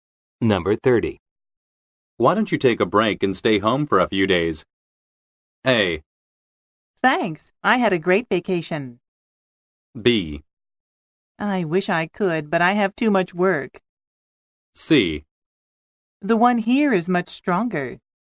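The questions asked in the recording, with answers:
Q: Why don't you take a break and stay home for a few days?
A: B: I wish I could, but I have too much work.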